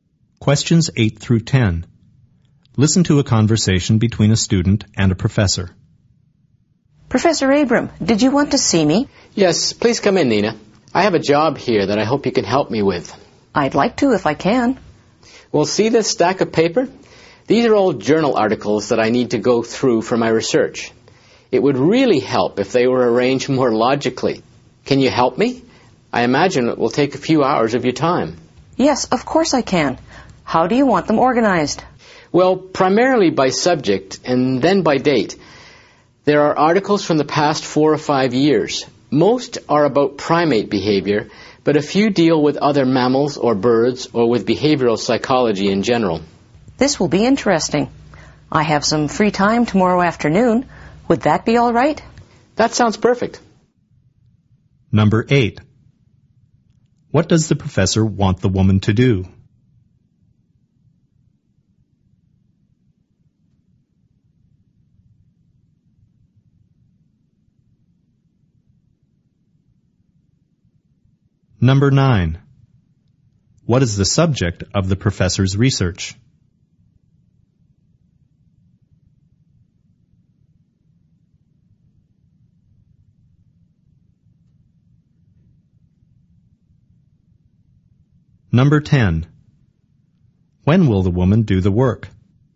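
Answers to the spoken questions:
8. Organize journal articles by subject and date
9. Primate behavior
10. Tomorrow afternoon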